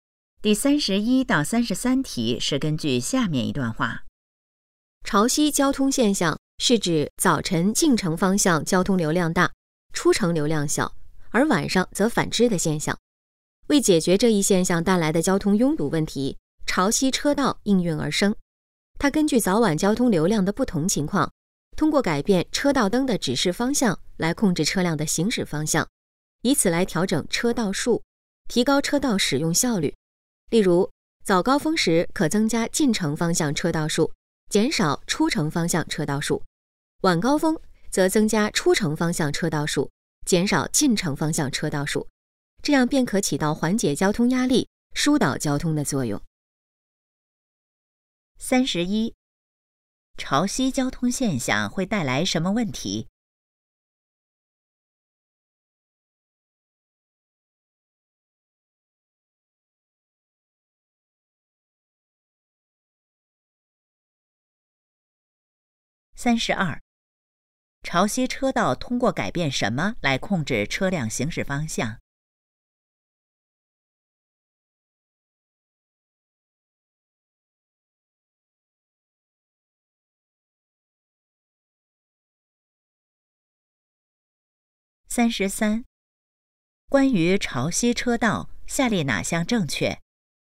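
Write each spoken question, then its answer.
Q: 潮汐交通现象会带来什么问题?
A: 交通拥堵

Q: 潮汐车道通过改变什么来控制车辆行驶方向?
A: 车道灯的指示方向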